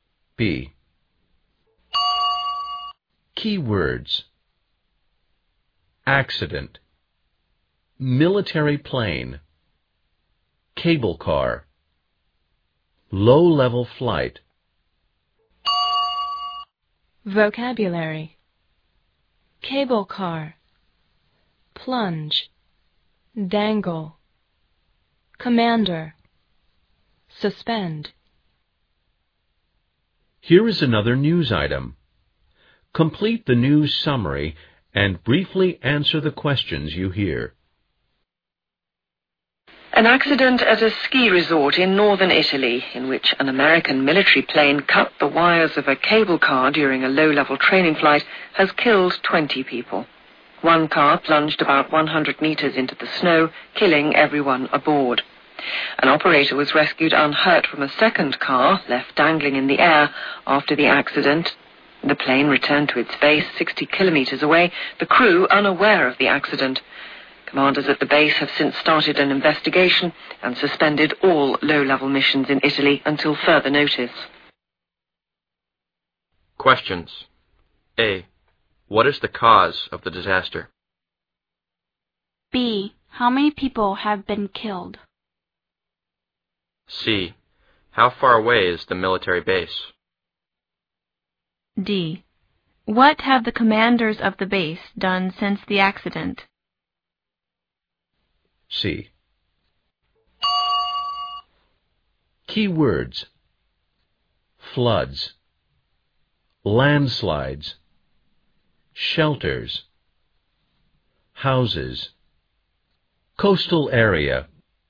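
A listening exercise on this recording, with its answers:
Here is another news item, complete the news summary and briefly answer the questions you hear.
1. What is the cause of the disaster?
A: An American military plane cut the wires of a cable car during a low-level training flight.

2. How many people have been killed?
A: 20

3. How far away is the military base?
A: 60 kilometers

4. What have the commanders of the base done since the accident?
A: Started an investigation and suspended all low-level missions in Italy until further notice.

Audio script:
B. Keywords. accident, military plane, cable car, low-level flight.
Vocabulary. cable car, plunge, dangle, commander, suspend.
A accident at a ski resort in Northern Italy in which an American military plane cut the wires of a cable car during a low-level training flight has killed 20 people.
One car plunged about 100 meters into the snow, killing everyone aboard.
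An operator was rescued unhurt from a second car left dangling in the air after the accident.
The plane returned to its base 60 kilometers away, the crew unaware of the accident.
Commanders of the base have since started an investigation and suspended all low-level missions in Italy until further notice.
Questions. A. What is the cause of the disaster?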